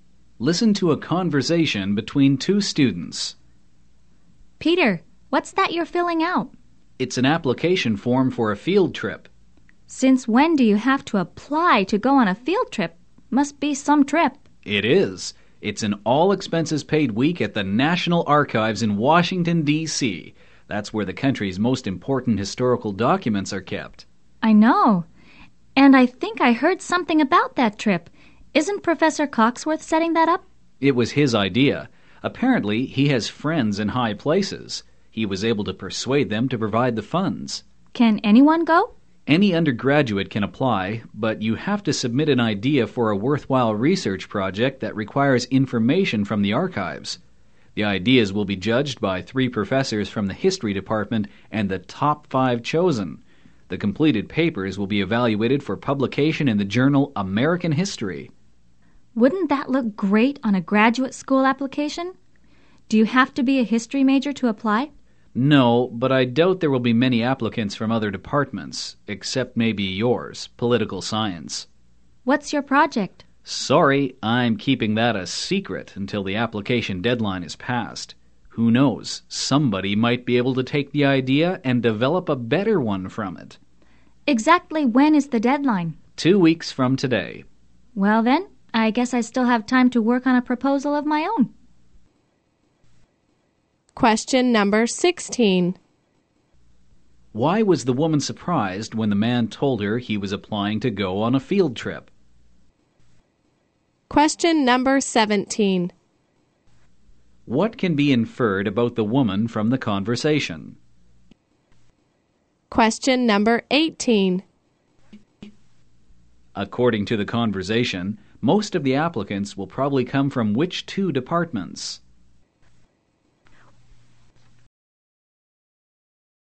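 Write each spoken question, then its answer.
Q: Why was the woman surprised when the man told her he was applying to go on a field trip?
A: She didn't know you had to apply for a field trip

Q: According to the conversation, most of the applicants will probably come from which two departments?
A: History and political science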